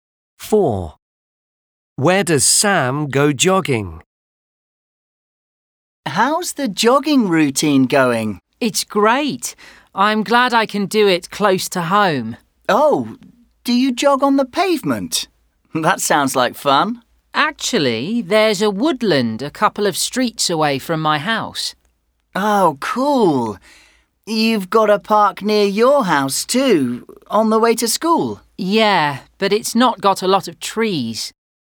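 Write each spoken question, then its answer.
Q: Where does Sam go jogging?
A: In a woodland near his house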